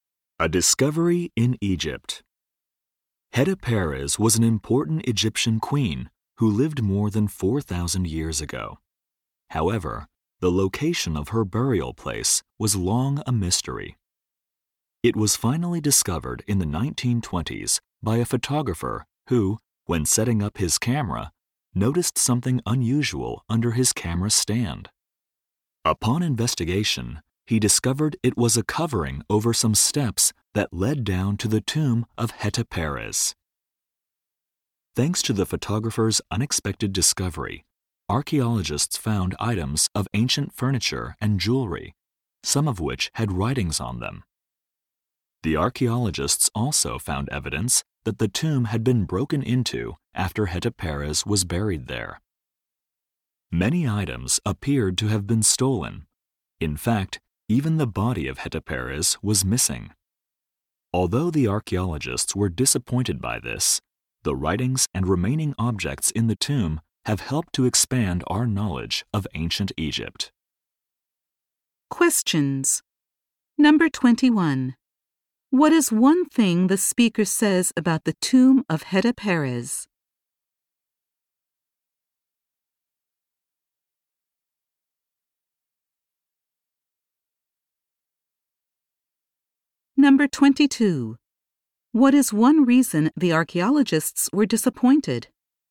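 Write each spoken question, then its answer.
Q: What is one thing the speaker says about the tomb of Hetepares?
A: It was found by a photographer by accident.

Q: What is one reason the archaeologists were disappointed?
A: The body of Hetepares was missing.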